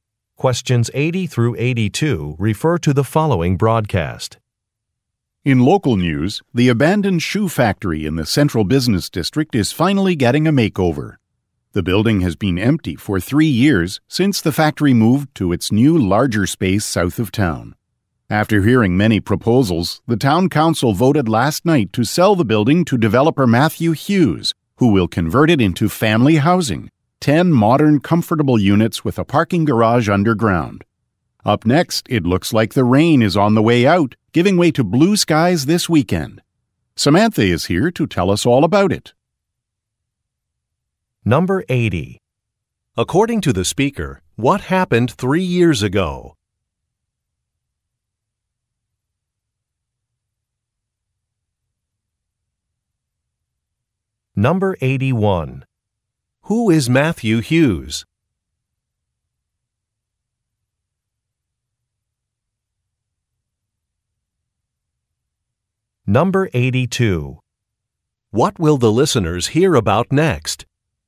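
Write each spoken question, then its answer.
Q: According to the speaker, what happened 3 years ago?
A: The shoe factory moved to a new location

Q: Who is Matthew Hughes?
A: A developer

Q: What will the listeners hear about next?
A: The weather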